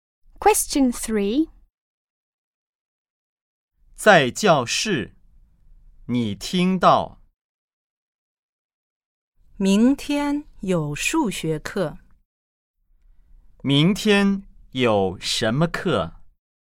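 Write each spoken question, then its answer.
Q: 明天有什么课?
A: 数学课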